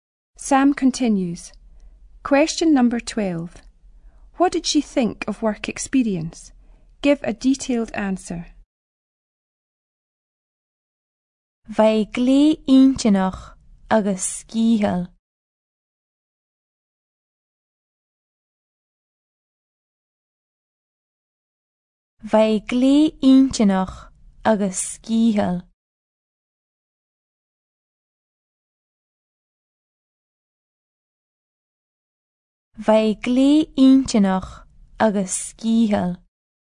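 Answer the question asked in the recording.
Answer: Very interesting and tiring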